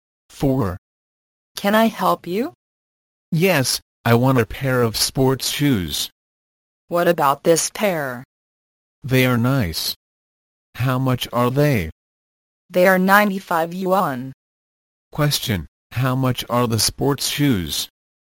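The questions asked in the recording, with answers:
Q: Question, how much are the sports shoes?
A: 95 yuan.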